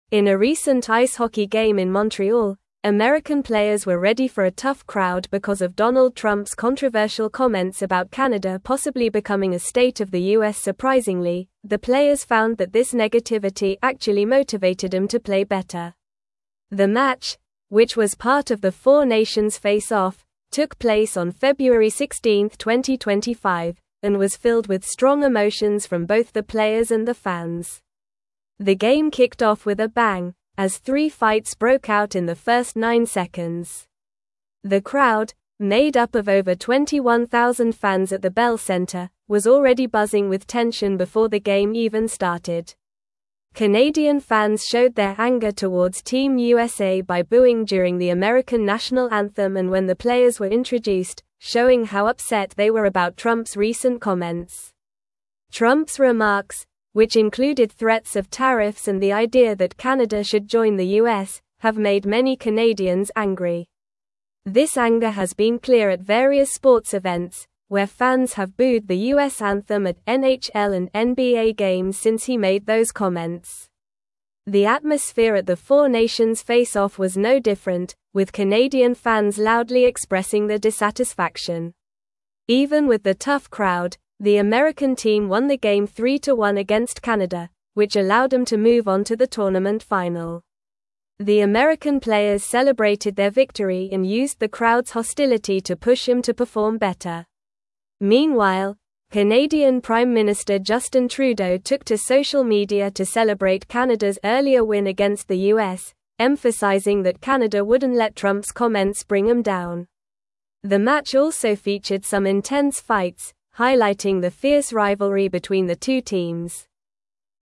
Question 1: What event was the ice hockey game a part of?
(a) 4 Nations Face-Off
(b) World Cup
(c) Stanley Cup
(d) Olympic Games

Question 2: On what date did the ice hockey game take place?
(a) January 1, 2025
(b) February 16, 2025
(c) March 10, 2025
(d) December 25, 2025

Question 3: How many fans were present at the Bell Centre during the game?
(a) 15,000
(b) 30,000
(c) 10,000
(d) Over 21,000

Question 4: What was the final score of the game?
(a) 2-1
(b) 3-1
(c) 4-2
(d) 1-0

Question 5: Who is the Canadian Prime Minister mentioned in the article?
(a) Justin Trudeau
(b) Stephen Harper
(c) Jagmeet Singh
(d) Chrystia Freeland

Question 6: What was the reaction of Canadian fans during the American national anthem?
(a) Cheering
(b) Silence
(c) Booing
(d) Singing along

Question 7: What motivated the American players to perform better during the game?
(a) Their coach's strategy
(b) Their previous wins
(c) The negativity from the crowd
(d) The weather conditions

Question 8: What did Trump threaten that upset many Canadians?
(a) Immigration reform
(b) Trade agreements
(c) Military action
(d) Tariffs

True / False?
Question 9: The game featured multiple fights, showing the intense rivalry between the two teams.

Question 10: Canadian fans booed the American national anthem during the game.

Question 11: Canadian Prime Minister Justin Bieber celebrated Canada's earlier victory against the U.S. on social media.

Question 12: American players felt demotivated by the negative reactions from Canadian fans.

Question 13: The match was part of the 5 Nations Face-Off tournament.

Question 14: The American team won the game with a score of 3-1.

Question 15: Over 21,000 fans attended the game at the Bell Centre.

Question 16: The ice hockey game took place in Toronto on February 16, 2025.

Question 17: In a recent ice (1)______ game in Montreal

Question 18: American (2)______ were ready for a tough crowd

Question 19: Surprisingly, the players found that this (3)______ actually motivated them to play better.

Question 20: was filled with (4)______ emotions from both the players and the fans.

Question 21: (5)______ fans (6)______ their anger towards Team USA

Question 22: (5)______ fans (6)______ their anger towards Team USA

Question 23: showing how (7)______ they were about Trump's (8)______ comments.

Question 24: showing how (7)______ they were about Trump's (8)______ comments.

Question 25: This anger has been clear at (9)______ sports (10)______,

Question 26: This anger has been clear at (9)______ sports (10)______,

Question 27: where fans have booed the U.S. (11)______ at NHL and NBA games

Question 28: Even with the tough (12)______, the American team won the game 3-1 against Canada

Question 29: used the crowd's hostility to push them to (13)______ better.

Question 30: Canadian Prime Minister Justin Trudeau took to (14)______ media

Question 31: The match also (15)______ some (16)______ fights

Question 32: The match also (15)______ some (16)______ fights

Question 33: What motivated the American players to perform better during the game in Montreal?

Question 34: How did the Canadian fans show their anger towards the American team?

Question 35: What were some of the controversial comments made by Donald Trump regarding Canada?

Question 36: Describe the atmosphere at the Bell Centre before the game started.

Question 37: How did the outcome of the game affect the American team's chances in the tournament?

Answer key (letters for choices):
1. a
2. b
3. d
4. b
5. a
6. c
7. c
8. d
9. True
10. True
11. False
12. False
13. False
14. True
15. True
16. False
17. hockey
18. players
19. negativity
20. strong
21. Canadian
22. showed
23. upset
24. recent
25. various
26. events
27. anthem
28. crowd
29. perform
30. social
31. featured
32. intense
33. The American players were motivated to perform better because they used the negativity from the Canadian crowd, which was angry due to Trump's comments, as motivation to push themselves harder.
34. The Canadian fans showed their anger by booing during the American national anthem and when the players were introduced, clearly expressing their dissatisfaction with Trump's remarks.
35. Donald Trump made comments suggesting that Canada could become a state of the U.S. and threatened to impose tariffs, which angered many Canadians.
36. The atmosphere at the Bell Centre was filled with tension and excitement, with over 21,000 fans buzzing and three fights breaking out in the first nine seconds of the game.
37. The American team's victory of 3-1 against Canada allowed them to move on to the tournament final, improving their chances of winning the overall tournament.

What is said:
In a recent ice hockey game in Montreal, American players were ready for a tough crowd because of Donald Trump's controversial comments about Canada possibly becoming a state of the U.S. Surprisingly, the players found that this negativity actually motivated them to play better. The match, which was part of the 4 Nations Face-Off, took place on February 16, 2025, and was filled with strong emotions from both the players and the fans.
The game kicked off with a bang, as three fights broke out in the first nine seconds. The crowd, made up of over 21,000 fans at the Bell Centre, was already buzzing with tension before the game even started. Canadian fans showed their anger towards Team USA by booing during the American national anthem and when the players were introduced, showing how upset they were about Trump's recent comments.
Trump's remarks, which included threats of tariffs and the idea that Canada should join the U.S., have made many Canadians angry. This anger has been clear at various sports events, where fans have booed the U.S. anthem at NHL and NBA games since he made those comments. The atmosphere at the 4 Nations Face-Off was no different, with Canadian fans loudly expressing their dissatisfaction.
Even with the tough crowd, the American team won the game 3-1 against Canada, which allowed them to move on to the tournament final. The American players celebrated their victory and used the crowd's hostility to push them to perform better. Meanwhile, Canadian Prime Minister Justin Trudeau took to social media to celebrate Canada's earlier win against the U.S., emphasizing that Canada wouldn't let Trump's comments bring them down. The match also featured some intense fights, highlighting the fierce rivalry between the two teams.

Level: Level 3